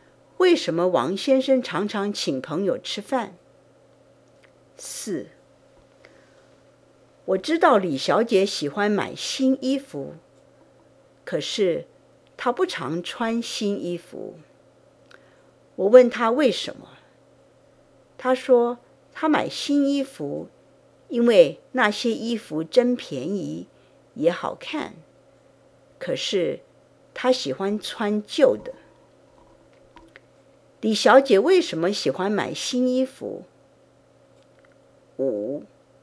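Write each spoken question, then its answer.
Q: 李小姐为什么喜欢买新衣服?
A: 因为那些衣服真便宜,也好看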